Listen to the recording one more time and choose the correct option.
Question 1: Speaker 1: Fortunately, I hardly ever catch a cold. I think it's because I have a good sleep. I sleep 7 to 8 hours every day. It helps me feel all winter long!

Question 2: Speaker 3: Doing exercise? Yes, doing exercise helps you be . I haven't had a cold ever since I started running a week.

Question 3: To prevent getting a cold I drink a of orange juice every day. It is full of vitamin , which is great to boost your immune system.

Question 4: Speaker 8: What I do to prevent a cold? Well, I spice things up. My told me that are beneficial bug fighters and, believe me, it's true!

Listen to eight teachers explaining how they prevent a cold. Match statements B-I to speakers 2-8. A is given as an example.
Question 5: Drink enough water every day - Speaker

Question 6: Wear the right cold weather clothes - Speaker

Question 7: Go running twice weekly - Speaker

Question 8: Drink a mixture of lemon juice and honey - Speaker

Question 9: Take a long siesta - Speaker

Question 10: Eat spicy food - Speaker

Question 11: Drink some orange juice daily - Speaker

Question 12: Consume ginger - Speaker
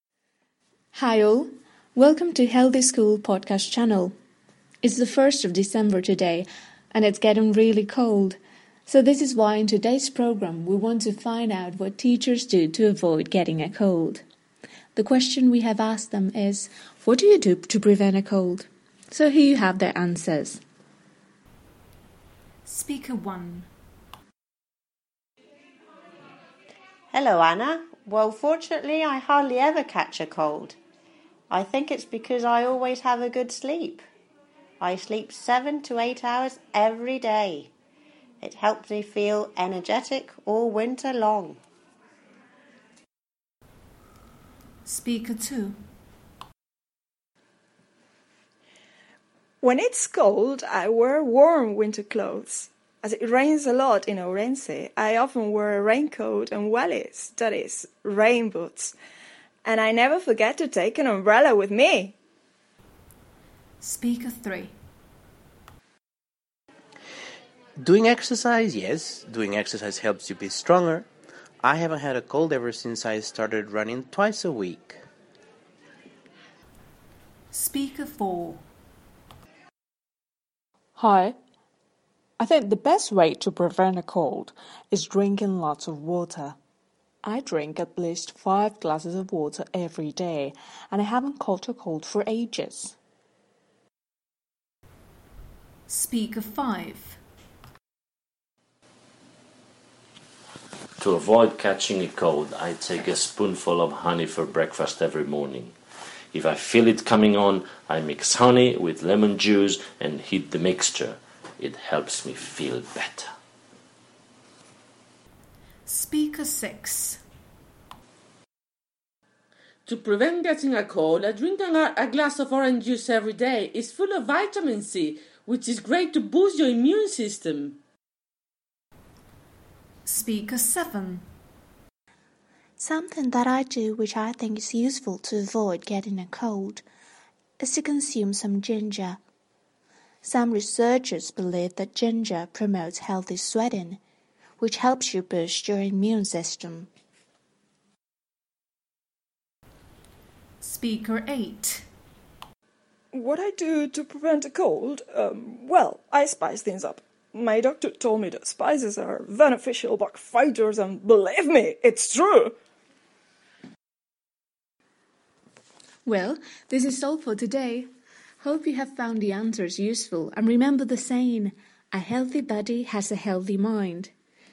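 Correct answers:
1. always; energetic
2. stronger; twice
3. glass; C
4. doctor; spices
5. Speaker 4
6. Speaker 2
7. Speaker 3
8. Speaker 5
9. No speaker (extra statement)
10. Speaker 8
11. Speaker 6
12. Speaker 7

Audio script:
Welcome to Healthy School Podcast Channel!
It's the 1st of December today and it's getting really cold. So this is why in today's programmewe wanted to find out what do to avoid getting a cold. The question we have asked them is: "What do you do to a cold?" So here you have their answers:
Speaker 1: Fortunately, I hardly ever catch a cold. I think it's because I have a good sleep. I sleep 7 to 8 hours every day. It helps me feel all winter long!
Speaker 2: When it's cold I wear winter clothes. As it rains a lot in Ourense, I often wear a and wellies, that is, rain boots. And I never forget to take an umbrella with me!
Speaker 3: Doing exercise? Yes, doing exercise helps you be . 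I haven't had a cold ever since I started running a week.
Speaker 4: I think the best way to prevent a cold is drinking lots of water. I drink at least five of water every day and I haven't caught a cold for !
Speaker 5: To avoid catching a cold, I take a spoonful of for breakfast every morning. If I feel it coming on, I mix honey with juice and heat the mixture.
Speaker 6:To prevent getting a cold I drink a of orange juice every day. It is full of vitamin , which is great to boost your immune system.
Speaker 7: Something that I do which I think is useful to avoid getting a cold is to consume some . Some believe that ginger promotes healthy sweating which helps you boost your immune system.
Speaker 8: What I do to prevent a cold? Well, I spice things up. My told me that are beneficial bug fighters and, believe me, it's true!
Well, this is all for today. Hope you have found the answers useful and remember the saying: a healthy body has a healthy mind!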